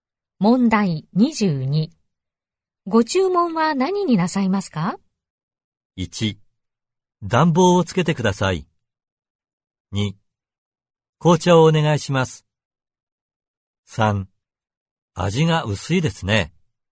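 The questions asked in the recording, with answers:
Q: ご注文は何になさいますか?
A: 2: 紅茶をお願いします。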